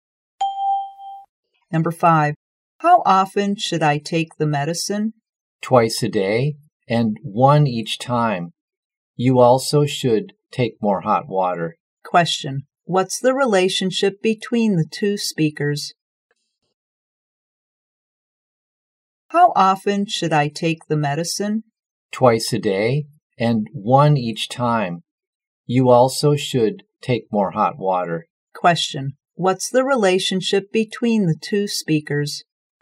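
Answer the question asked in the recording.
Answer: Doctor and patient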